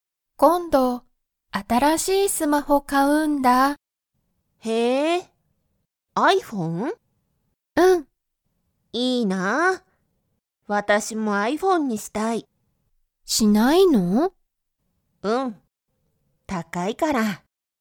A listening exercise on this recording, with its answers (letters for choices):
Comprehension Quiz (Skip if you don't understand the conversation yet)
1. ミサキは、iPhoneを持(も)っていますか?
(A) はい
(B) いいえ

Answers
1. B